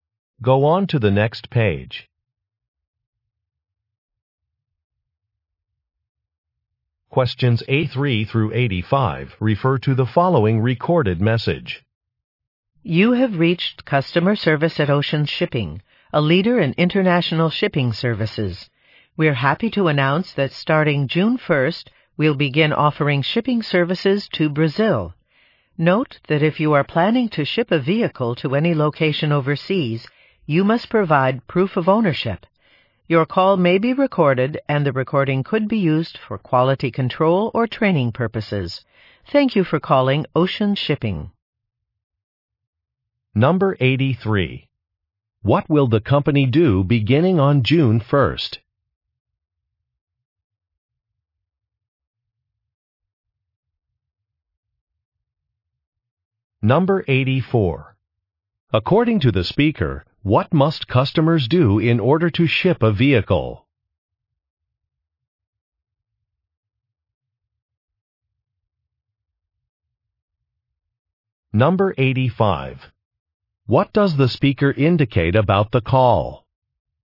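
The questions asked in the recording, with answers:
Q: What will the company do beginning on June 1st?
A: Offer shipping services to Brazil

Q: According to the speaker, what must customers do in order to ship a vehicle?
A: Provide proof of ownership

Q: What does the speaker indicate about the call?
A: It may be recorded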